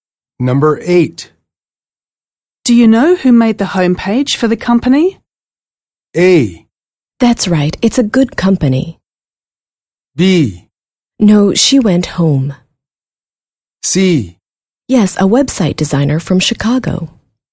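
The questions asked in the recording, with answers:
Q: Do you know who made the homepage for the company?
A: C: Yes, a website designer from Chicago.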